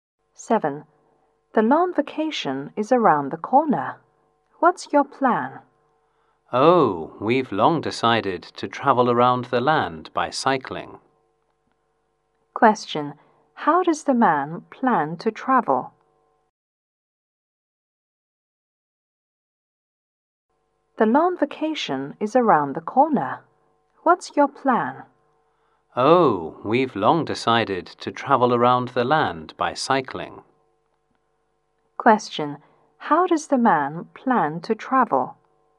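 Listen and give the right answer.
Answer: By cycling.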